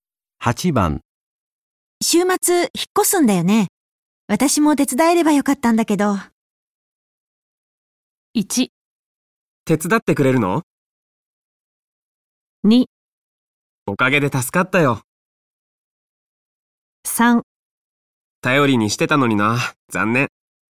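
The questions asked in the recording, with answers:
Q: 週末引っ越すんだよね。私も手伝えればよかったんだけど。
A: 3: 頼りにしてたのにな、残念。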